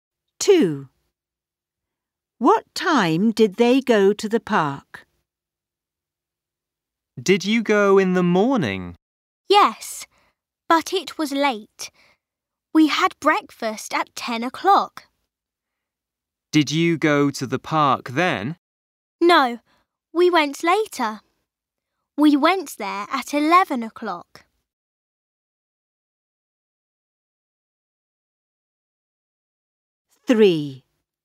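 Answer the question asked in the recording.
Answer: At 11 o'clock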